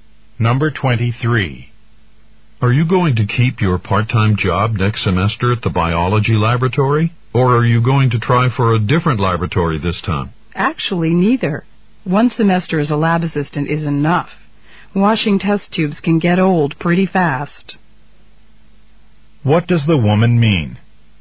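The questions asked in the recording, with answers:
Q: What does the woman mean?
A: She won't work as a lab assistant next semester.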